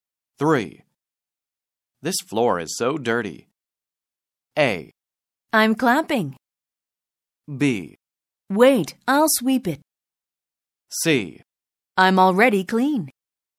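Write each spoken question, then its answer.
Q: This floor is so dirty.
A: B: Wait, I'll sweep it.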